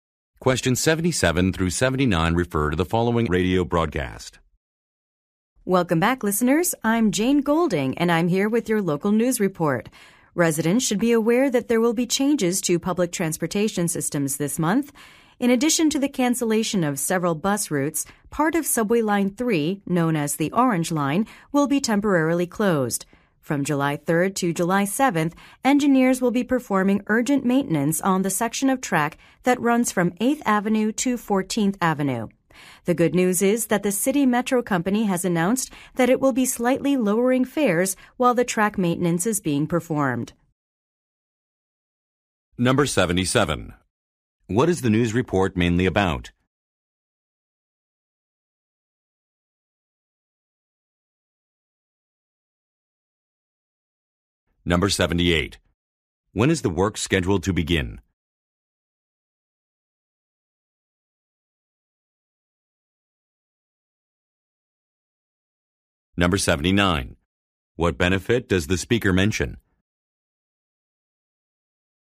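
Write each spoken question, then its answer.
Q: What is the news report mainly about?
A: Changes to public transportation

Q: When is the work scheduled to begin?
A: July 3rd

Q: What benefit does the speaker mention?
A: Slightly lower fares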